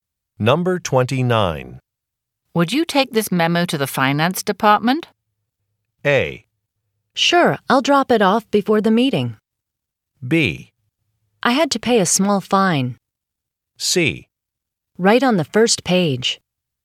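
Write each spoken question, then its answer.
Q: Would you take this memo to the finance department?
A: A: Sure, I'll drop it off before the meeting.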